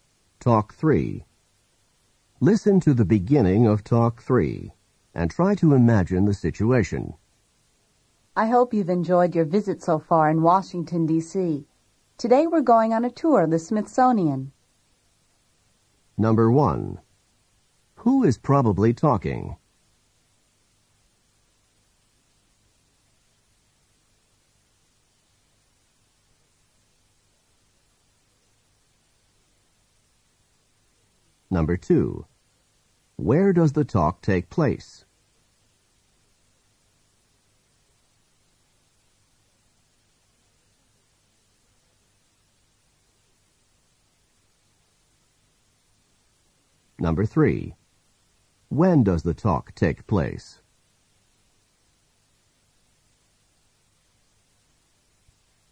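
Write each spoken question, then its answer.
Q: Who is probably talking?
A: A tour guide

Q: Where does the talk take place?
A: In Washington, D.C.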